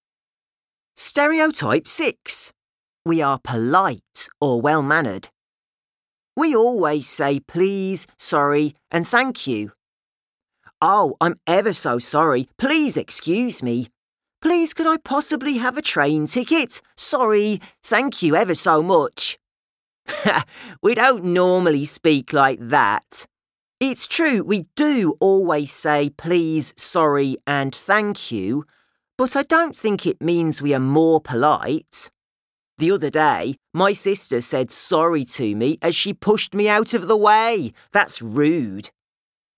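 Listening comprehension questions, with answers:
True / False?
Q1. If many people in the country say 'thank you' it doesn't mean that the British are more polite than other nations.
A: True

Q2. Josh thinks that his sister is rude because she didn't say 'thank you'.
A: False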